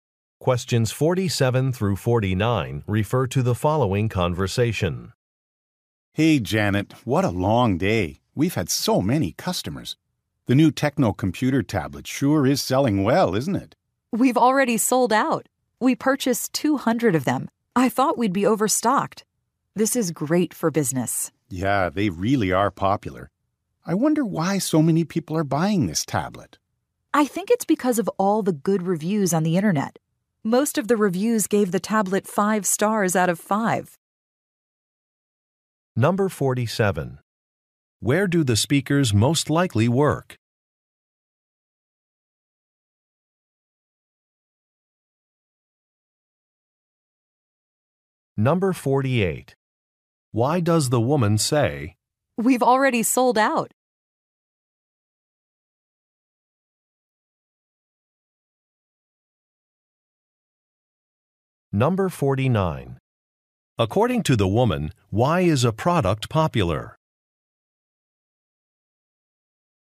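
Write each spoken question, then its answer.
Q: Where do the speakers most likely work?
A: At an electronics store

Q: According to the woman, why is a product popular?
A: It got good online reviews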